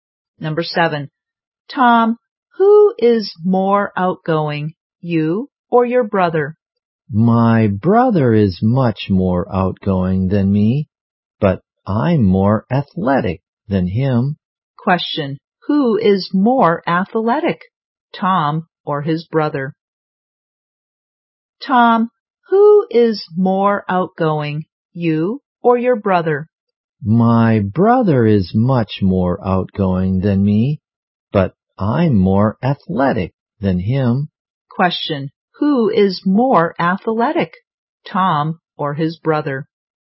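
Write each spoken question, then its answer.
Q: Who is more athletic, Tom or his brother?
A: Tom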